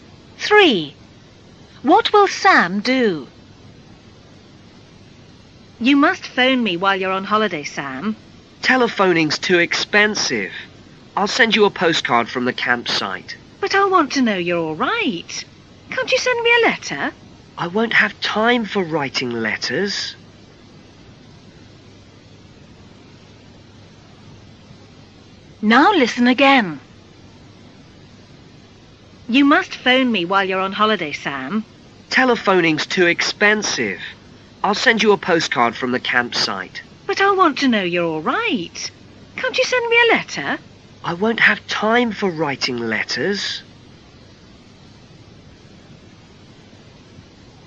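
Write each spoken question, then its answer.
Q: What will Sam do?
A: Send a postcard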